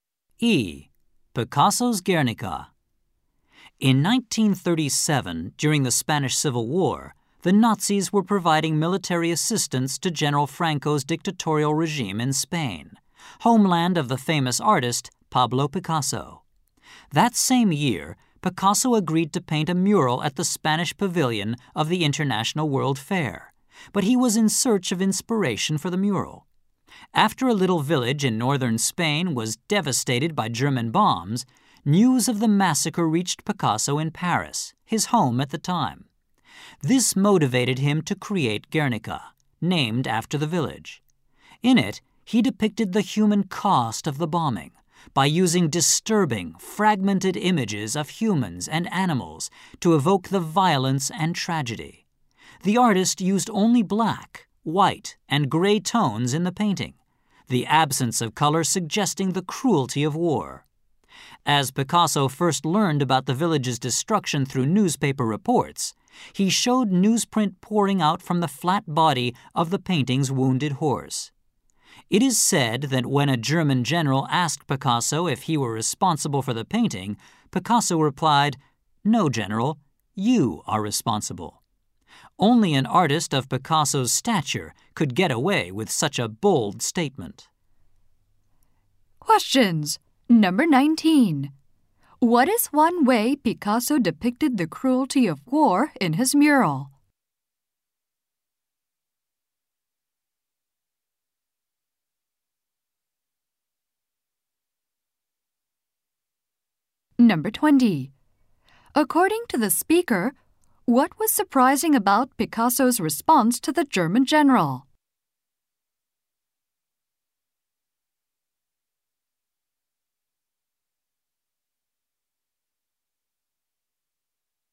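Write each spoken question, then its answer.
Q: According to the speaker, what was surprising about Picasso's response to the German general?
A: It was a bold statement blaming the general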